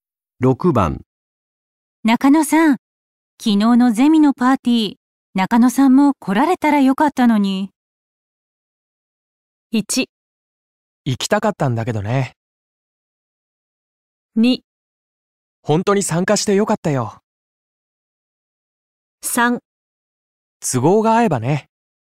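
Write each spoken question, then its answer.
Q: 中野さん、昨日のゼミのパーティー、中野さんも来られたらよかったのに。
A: 1: 行きたかったんだけどね。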